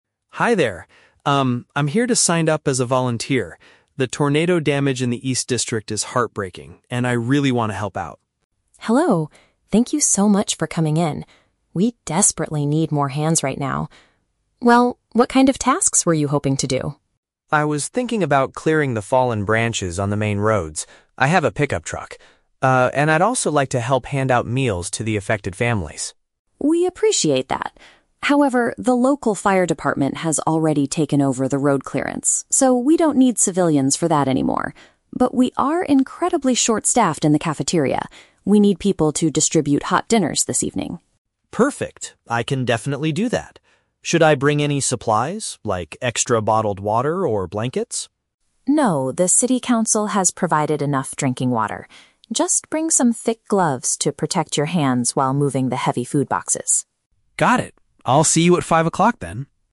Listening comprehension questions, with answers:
Listen to a conversation between a citizen and a community center coordinator, and choose the correct answer (A, B, or C) for each question.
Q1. What task does David NOT get to do?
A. Removing debris from the streets.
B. Serving cooked food to victims.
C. Organizing donated clothing in the shelter.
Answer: A. Removing debris from the streets.

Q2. Why is David's first choice of volunteer work unavailable?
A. Because his vehicle is not big enough for the job.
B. Because professional emergency workers are handling it.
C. Because the eastern district is currently too dangerous to enter.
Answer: B. Because professional emergency workers are handling it.

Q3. What does Rachel instruct David to bring with him?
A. Large containers of drinking water.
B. Warm bedding for the homeless families.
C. Protective gear for his hands.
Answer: C. Protective gear for his hands.

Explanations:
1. David initially wants to "clear the fallen branches on the main roads" (removing debris from the streets), but Rachel tells him they don't need civilians for that anymore.
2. Rachel explains that the "local fire department has already taken over the road clearance." The fire department is a group of "professional emergency workers."
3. Rachel tells David to "bring some thick gloves". "Protective gear for his hands" is a direct paraphrase of thick gloves.

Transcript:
David: Hi there. Um, I'm here to sign up as a volunteer. The tornado damage in the east district is heartbreaking, and I really want to help out.
Rachel: Hello! Thank you so much for coming in. We desperately need more hands right now. Well, what kind of tasks were you hoping to do?
David: I was thinking about clearing the fallen branches on the main roads. I have a pickup truck. Ah, and I'd also like to help hand out meals to the affected families.
Rachel: We appreciate that. However, the local fire department has already taken over the road clearance, so we don't need civilians for that anymore. But we are incredibly short-staffed in the cafeteria. We need people to distribute hot dinners this evening.
David: Perfect. I can definitely do that. Should I bring any supplies, like extra bottled water or blankets?
Rachel: No, the city council has provided enough drinking water. Just bring some thick gloves to protect your hands while moving the heavy food boxes.
David: Got it. I'll see you at five o'clock then.

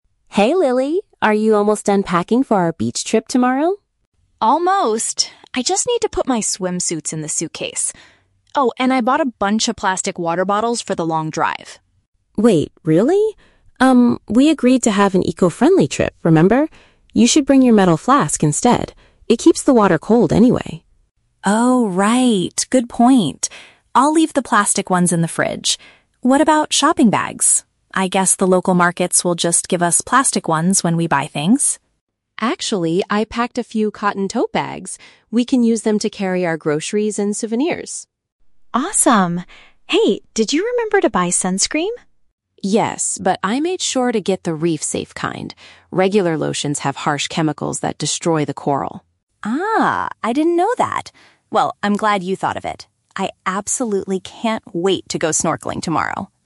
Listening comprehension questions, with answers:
Listen to two roommates packing for a beach holiday. Choose the correct answer (A, B, or C) for each question.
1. What will Lily take to drink from during the car journey?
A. Several single-use plastic bottles.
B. A reusable liquid container.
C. A large cup of iced coffee.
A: B. A reusable liquid container.

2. How are the girls going to carry the items they buy at the market?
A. In the plastic bags provided by local shops.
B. In their personal travel suitcases.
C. In cloth bags that Emma brought.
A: C. In cloth bags that Emma brought.

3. Why did Emma choose a specific type of sun protection?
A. It does not cause harm to underwater environments.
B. It protects their skin from dangerous chemicals in the ocean.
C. It is completely waterproof for long snorkeling sessions.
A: A. It does not cause harm to underwater environments.

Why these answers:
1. Emma suggests that Lily bring her "metal flask" instead of plastic bottles. "Metal flask" is paraphrased as "reusable liquid container". Why traps are wrong: Option A is the trap. Lily originally bought "plastic water bottles", but she changed her mind and agreed to leave them in the fridge. Option C is plausible for a drive, but it is never mentioned.
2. Emma says she packed some "cotton tote bags" for them to carry groceries and souvenirs. "Cotton tote bags" is paraphrased as "cloth bags". Why traps are wrong: Option A is the trap. Lily assumes the markets will give them plastic bags, but Emma corrects her with a better solution. Option B mentions "suitcases," which Lily uses for her swimsuits, not for market shopping.
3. Emma bought a "reef-safe" sunscreen because regular ones have chemicals that "destroy the coral". This means her choice prevents harm to the underwater environment. Why traps are wrong: Option B is the trap. The audio mentions "chemicals", but they are in regular sunscreen, not in the ocean water. Option C is plausible for a beach trip, but waterproof features are not mentioned in the conversation.

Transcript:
Emma: Hey Lily, are you almost done packing for our beach trip tomorrow?
Lily: Almost! I just need to put my swimsuits in the suitcase. Oh, and I bought a bunch of plastic water bottles for the long drive.
Emma: Wait, really? Um, we agreed to have an eco-friendly trip, remember? You should bring your metal flask instead. It keeps the water cold anyway.
Lily: Oh, right! Good point. I'll leave the plastic ones in the fridge. What about shopping bags? I guess the local markets will just give us plastic ones when we buy things.
Emma: Actually, I packed a few cotton tote bags. We can use them to carry our groceries and souvenirs.
Lily: Awesome. Hey, did you remember to buy sunscreen?
Emma: Yes, but I made sure to get the reef-safe kind. Regular lotions have harsh chemicals that destroy the coral.
Lily: Ah, I didn't know that. Well, I'm glad you thought of it. I absolutely can't wait to go snorkeling tomorrow!

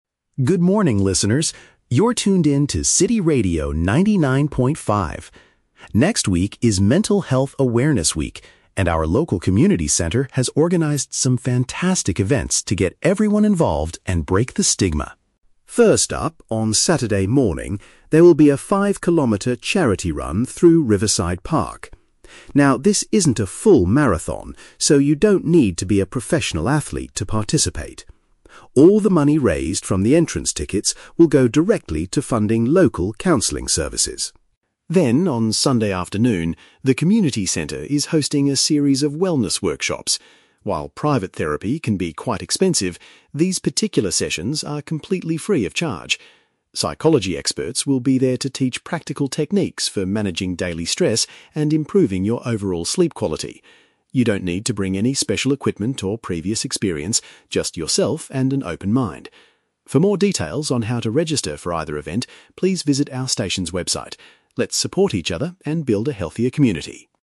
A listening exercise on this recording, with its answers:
Listen to a radio announcement. Choose the correct answer (A, B, or C) for each question.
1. What is the main purpose of the event on Saturday morning?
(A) To train local residents for an upcoming marathon.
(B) To collect financial support for therapy programs.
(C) To clean up the environment in Riverside Park.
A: (B) To collect financial support for therapy programs.

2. What does the announcer say about the Sunday workshops?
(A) Participants must pay a high fee to see the experts.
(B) Attendees are required to buy special health equipment.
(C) They will show people how to handle everyday pressure.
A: (C) They will show people how to handle everyday pressure.

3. How can listeners sign up for these community activities?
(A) By calling the community center's phone number directly.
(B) By going to the radio program's website on the internet.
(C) By visiting the radio station in person on Saturday.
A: (B) By going to the radio program's website on the internet.

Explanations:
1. The Key: Michael says that "All the money raised... will go directly to funding local counseling services." This is paraphrased perfectly as "collect financial support for therapy programs." The Trap (A): The word "marathon" is mentioned, but Michael explicitly says "this isn't a full marathon" (Mentioned but rejected). Plausible Trap (C): Riverside Park is where the run takes place, and cleaning up the park is a common community event, but it is not the purpose of this specific event.
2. The Key: The experts will teach "practical techniques for managing daily stress", which matches the phrase "show people how to handle everyday pressure." The Trap (A): The audio mentions that private therapy can be "expensive" (high fee), but states that these specific workshops are "completely free of charge" (Mentioned but wrong context). The Trap (B): Michael specifically tells the listeners, "You don't need to bring any special equipment" (Mentioned but rejected).
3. The Key: Michael tells the listeners to "visit our station's website" for registration details, which is paraphrased as "going to the radio program's website on the internet." Plausible Trap (A): Calling the community center is a logical way to register for a community event, but it is not the method given in the announcement. The Trap (C): Saturday is mentioned as the day of the charity run, not the day you should visit the radio station (Mentioned but wrong context).

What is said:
Michael: Good morning, listeners! You're tuned in to City Radio 99.5. Next week is Mental Health Awareness Week, and our local community center has organized some fantastic events to get everyone involved and break the stigma.
First up, on Saturday morning, there will be a 5-kilometer charity run through Riverside Park. Now, this isn't a full marathon, so you don't need to be a professional athlete to participate. All the money raised from the entrance tickets will go directly to funding local counseling services.
Then, on Sunday afternoon, the community center is hosting a series of wellness workshops. While private therapy can be quite expensive, these particular sessions are completely free of charge. Psychology experts will be there to teach practical techniques for managing daily stress and improving your overall sleep quality. You don't need to bring any special equipment or previous experience—just yourself and an open mind. For more details on how to register for either event, please visit our station's website. Let's support each other and build a healthier community!

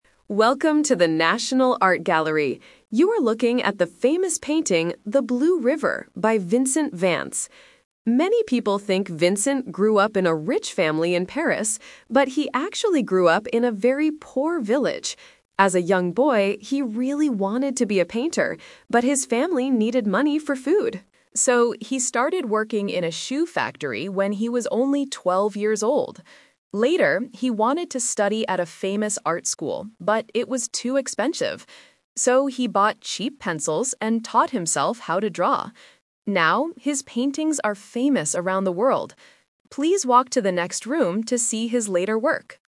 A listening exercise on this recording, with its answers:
Listen to an audio guide at an art gallery talking about the painter Vincent Vance. For each question, choose the correct answer (A, B, or C).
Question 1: Where did Vincent Vance grow up?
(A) In Paris.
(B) In a poor village.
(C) In a large city.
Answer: (B) In a poor village.

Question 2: What did Vincent do when he was twelve years old?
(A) He painted famous pictures.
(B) He went to a new school.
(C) He worked in a shoe factory.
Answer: (C) He worked in a shoe factory.

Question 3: How did Vincent learn to draw?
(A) He went to a famous art school.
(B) He taught himself with cheap pencils.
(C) His father taught him at home.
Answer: (B) He taught himself with cheap pencils.

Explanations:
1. The audio guide clarifies his background: "...but he actually grew up in a very poor village." Why the traps are wrong: Option A is the "Twist Trap". The guide mentions that many people think he grew up in Paris, but he didn't. Option C is not mentioned.
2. The guide explains his first job: "So, he started working in a shoe factory when he was only twelve years old." Why the traps are wrong: Option A is a trap because he wanted to be a painter, but he had to work for money instead. Option B is not mentioned.
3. The guide explains how he learned: "So, he bought cheap pencils and taught himself how to draw." Why the traps are wrong: Option A is a "Twist Trap". He wanted to study at a famous art school, but he couldn't because it was too expensive. Option C is a plausible guess but not mentioned in the audio.

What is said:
Audio Guide: Welcome to the National Art Gallery. You are looking at the famous painting, 'The Blue River' by Vincent Vance.
Many people think Vincent grew up in a rich family in Paris, but he actually grew up in a very poor village.
As a young boy, he really wanted to be a painter, but his family needed money for food. So, he started working in a shoe factory when he was only twelve years old.
Later, he wanted to study at a famous art school, but it was too expensive. So, he bought cheap pencils and taught himself how to draw. Now, his paintings are famous around the world. Please walk to the next room to see his later work.

